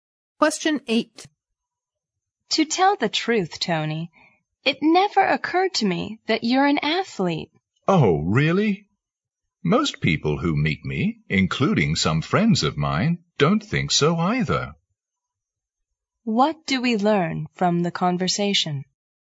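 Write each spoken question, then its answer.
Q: What do we learn from the conversation?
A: Most people don't think Tony looks like an athlete.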